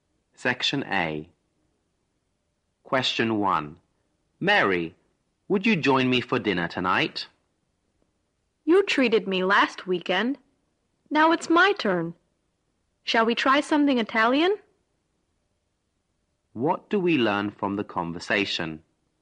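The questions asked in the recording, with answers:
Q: What do we learn from the conversation?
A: The man is inviting Mary to dinner, to return her treat from last weekend.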